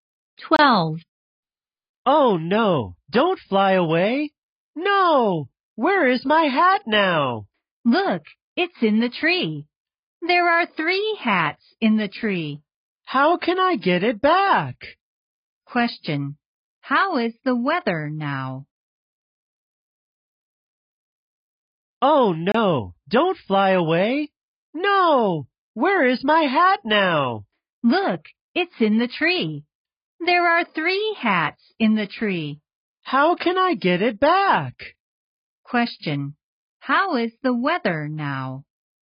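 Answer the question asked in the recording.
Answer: It's windy.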